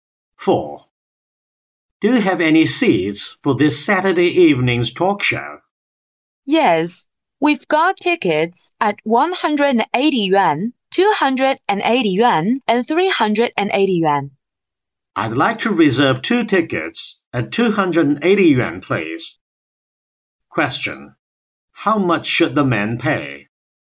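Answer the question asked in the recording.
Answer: 560 yuan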